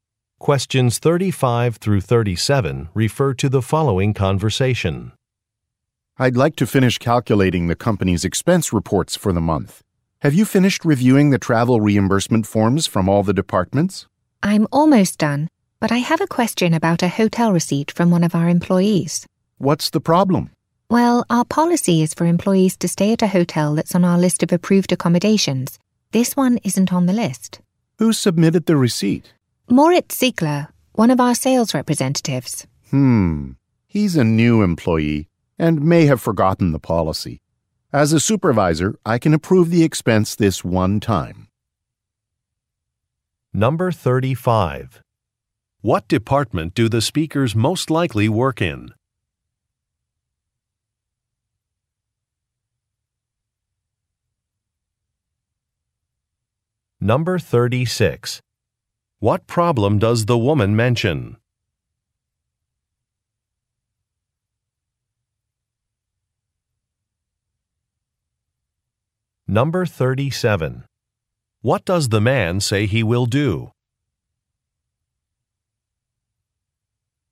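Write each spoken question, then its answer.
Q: What department do the speakers most likely work in?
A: Accounting

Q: What problem does the woman mention?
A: A hotel is not on the approved list

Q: What does the man say he will do?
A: Approve the expense this one time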